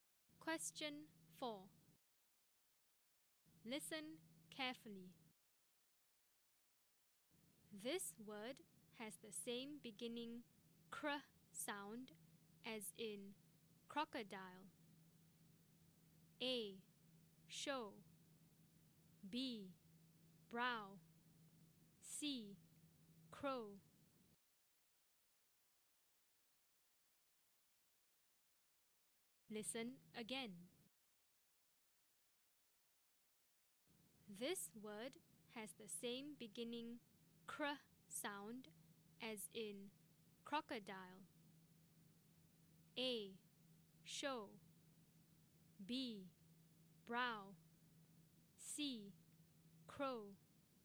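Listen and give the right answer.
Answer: C: Crow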